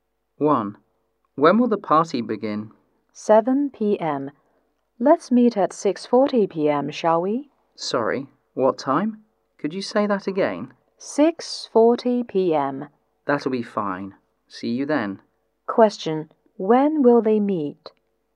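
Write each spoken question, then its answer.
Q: When will they meet?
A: At 6:40 p.m.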